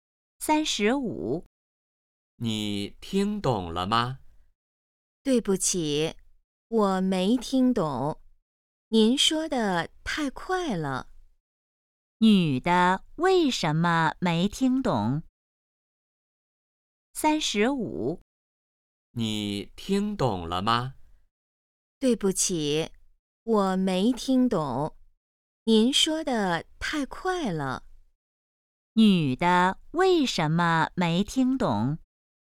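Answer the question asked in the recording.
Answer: 说得太快了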